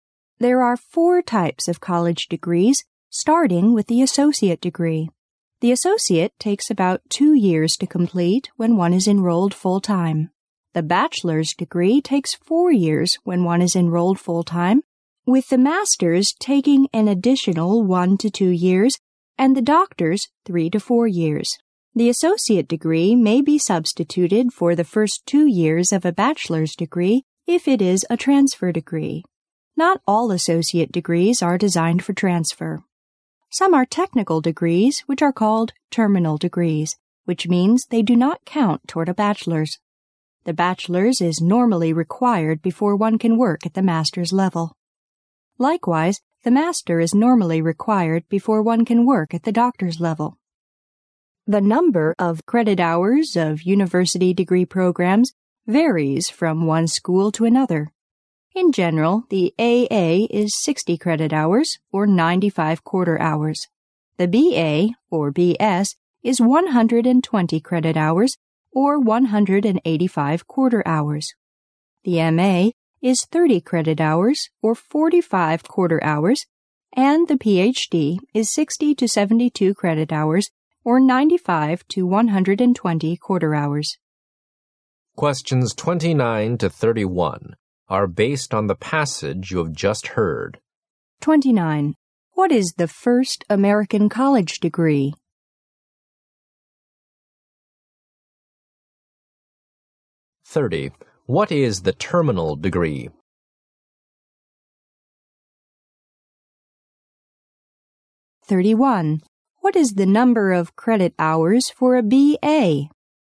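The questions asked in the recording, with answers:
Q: What is the first American college degree?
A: The associate degree

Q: What is the terminal degree?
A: A technical degree that doesn't count toward a bachelor's

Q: What is the number of credit hours for a BA?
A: 120 credit hours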